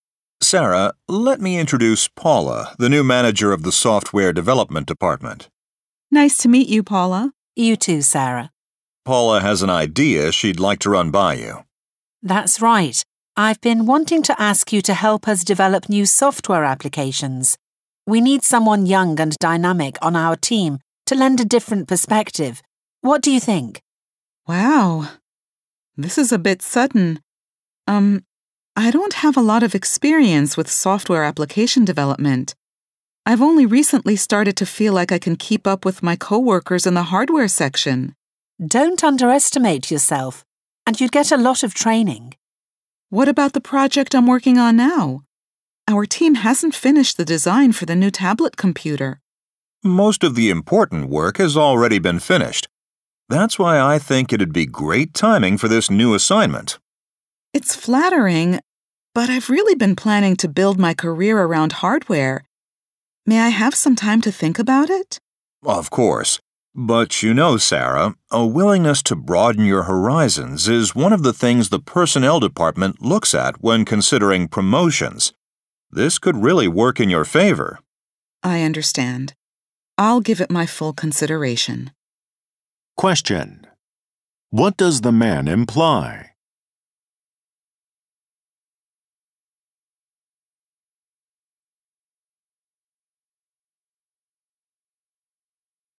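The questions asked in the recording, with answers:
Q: What does the man imply?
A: Accepting the new software assignment could help Sarah get promoted.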